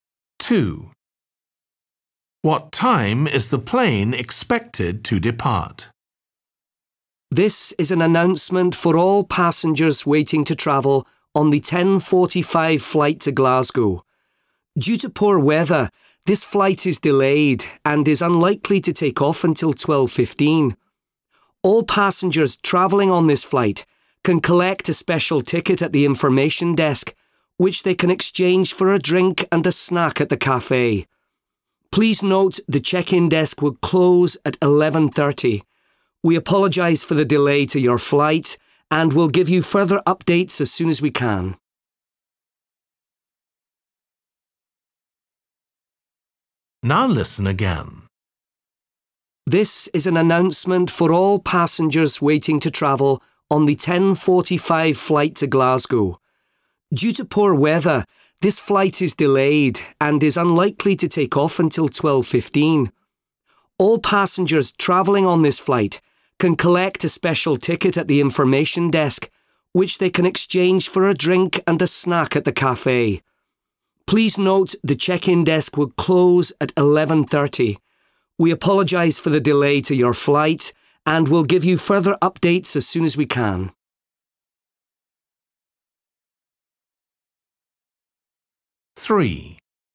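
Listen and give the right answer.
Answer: 12:15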